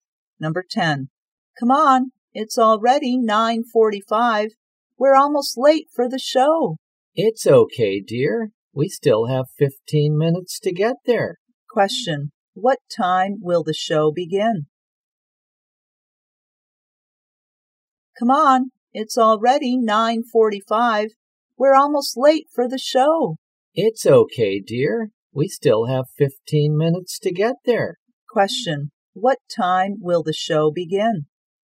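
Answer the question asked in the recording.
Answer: At 10:00.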